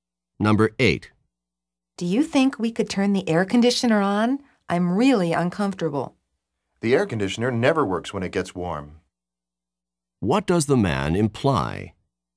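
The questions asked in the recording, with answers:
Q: What does the man imply?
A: Turning on the air conditioner won't help because it doesn't work when it's warm.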